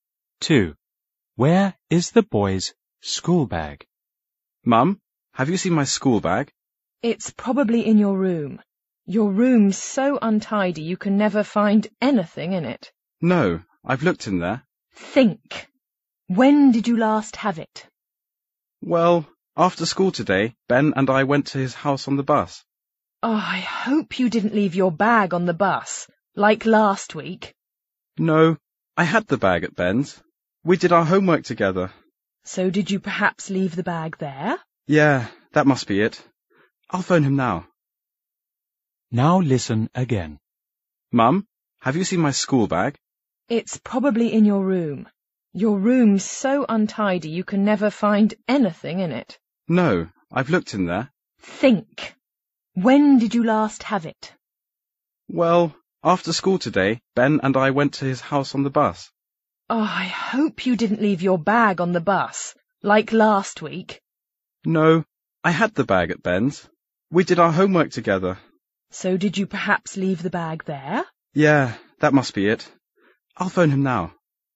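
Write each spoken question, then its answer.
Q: Where is the boy's school bag?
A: At Ben's house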